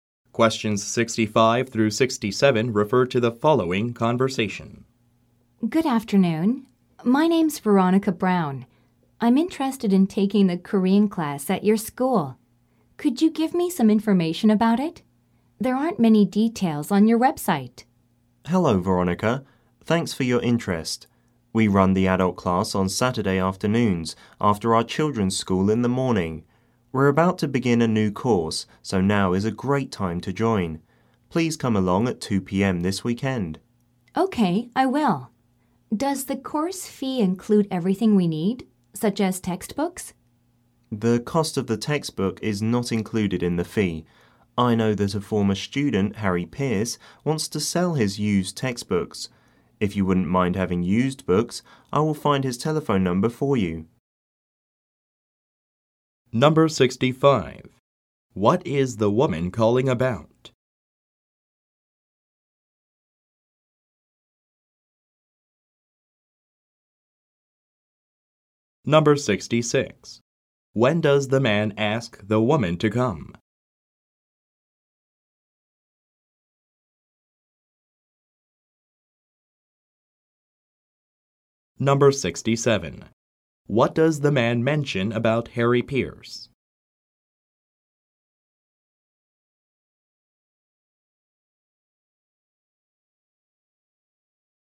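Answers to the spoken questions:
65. Taking the Korean class at the school
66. At 2 p.m. this weekend (Saturday afternoon)
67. He is a former student who wants to sell his used textbooks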